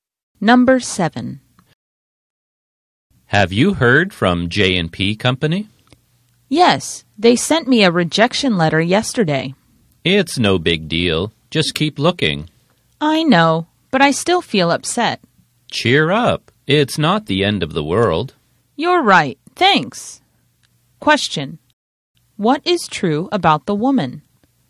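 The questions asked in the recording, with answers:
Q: What is true about the woman?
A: She got a rejection letter from J&P Company and feels upset.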